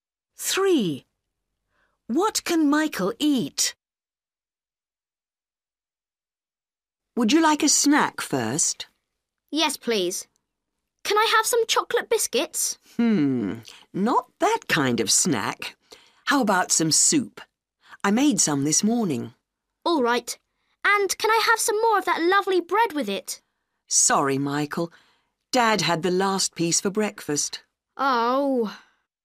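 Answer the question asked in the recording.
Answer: soup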